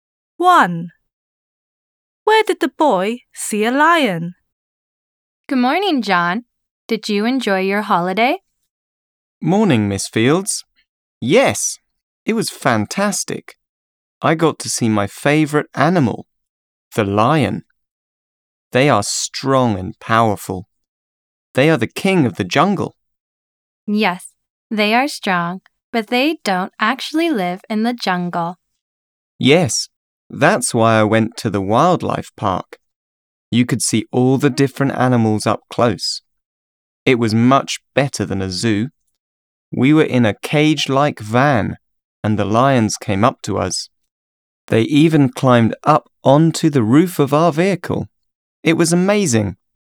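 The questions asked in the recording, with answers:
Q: Where did the boy see a lion?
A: At a wildlife park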